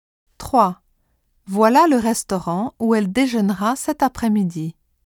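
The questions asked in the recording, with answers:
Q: Voilà le restaurant où elle déjeunera cet après-midi.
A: où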